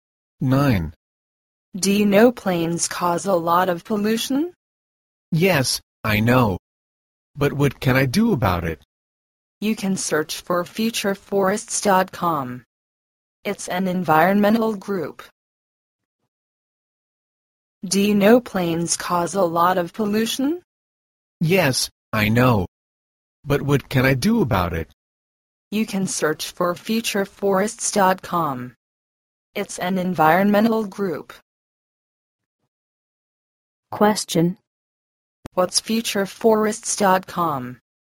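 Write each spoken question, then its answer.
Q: What's futureforests.com?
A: An environmental group.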